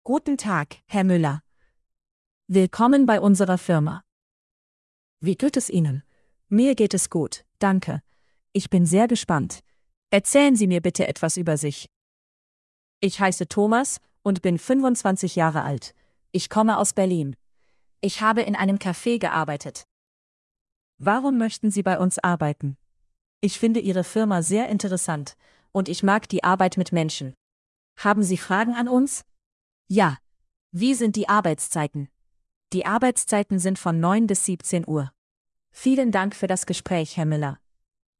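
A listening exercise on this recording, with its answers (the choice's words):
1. Wie alt ist Thomas?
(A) 25 Jahre alt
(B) 30 Jahre alt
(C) 20 Jahre alt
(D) 22 Jahre alt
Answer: 25 Jahre alt

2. Wo hat Thomas gearbeitet?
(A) In einem Café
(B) In einem Büro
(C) In einer Schule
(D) In einem Supermarkt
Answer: In einem Café

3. Was fragt Thomas über die Firma?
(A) Die Arbeitszeiten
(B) Das Gehalt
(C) Die Urlaubstage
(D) Die Lage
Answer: Die Arbeitszeiten

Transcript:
Guten Tag, Herr Müller. Willkommen bei unserer Firma. Wie geht es Ihnen? Mir geht es gut, danke. Ich bin sehr gespannt. Erzählen Sie mir bitte etwas über sich. Ich heiße Thomas und bin 25 Jahre alt. Ich komme aus Berlin. Ich habe in einem Café gearbeitet. Warum möchten Sie bei uns arbeiten? Ich finde Ihre Firma sehr interessant und ich mag die Arbeit mit Menschen. Haben Sie Fragen an uns? Ja, wie sind die Arbeitszeiten? Die Arbeitszeiten sind von 9 bis 17 Uhr. 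Vielen Dank für das Gespräch, Herr Müller.

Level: A1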